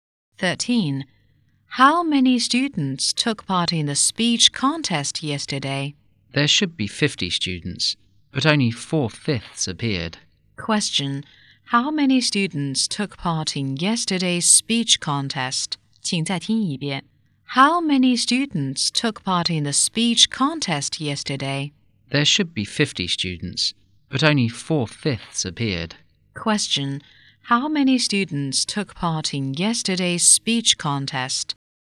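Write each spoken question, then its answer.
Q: How many students took part in yesterday's speech contest?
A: 40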